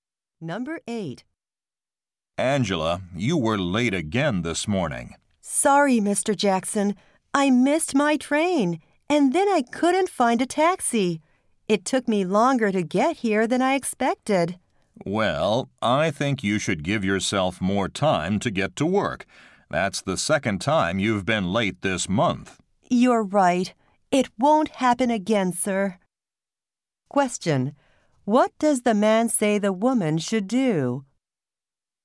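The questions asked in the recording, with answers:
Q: What does the man say the woman should do?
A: Give herself more time to get to work.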